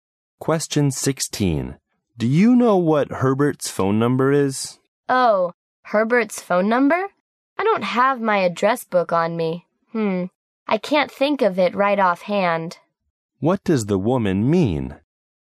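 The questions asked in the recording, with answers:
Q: What does the woman mean?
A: She can't remember Herbert's number right now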